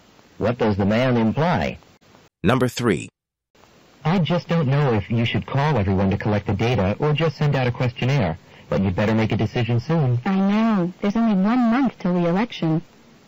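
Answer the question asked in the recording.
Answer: She needs to decide soon because the election is only a month away.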